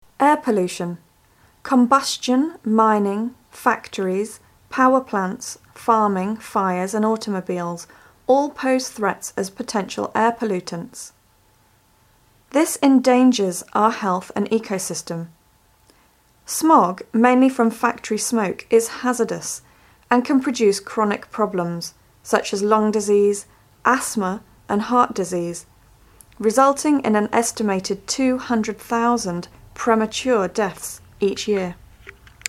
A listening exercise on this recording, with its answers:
Listen to the recordings and fill in the gaps. You may use no more than 3 words and/or numbers to complete the sentences.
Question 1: Combustion, mining, factories, (1)..................., farming, fires and automobiles all pose threats as potential air pollutants.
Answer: power plants

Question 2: Smog, mainly from factory smoke, is (2).................. and can produce chronic problems such as lung disease, asthma and heart disease, resulting in an estimated 200,000 (3)............ deaths per year.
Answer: hazardous

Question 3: Smog, mainly from factory smoke, is (2).................. and can produce chronic problems such as lung disease, asthma and heart disease, resulting in an estimated 200,000 (3)............ deaths per year.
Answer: premature